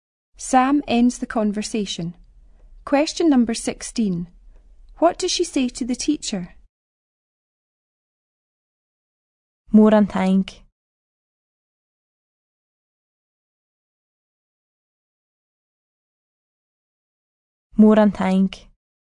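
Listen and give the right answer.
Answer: Thank you very much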